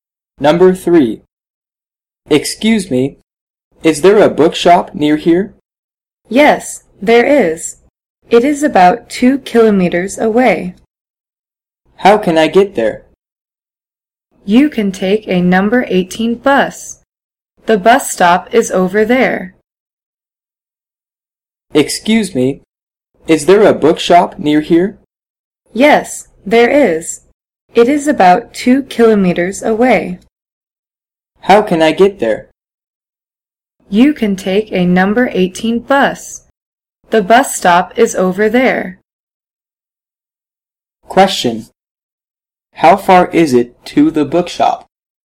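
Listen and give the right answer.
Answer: About 2 kilometers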